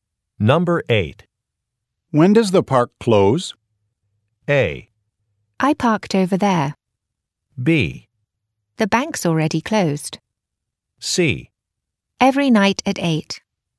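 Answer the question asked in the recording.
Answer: C: Every night at 8.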